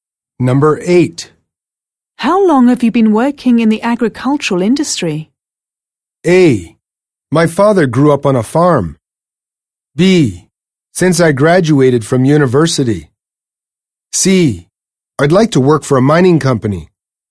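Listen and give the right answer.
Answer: B: Since I graduated from university.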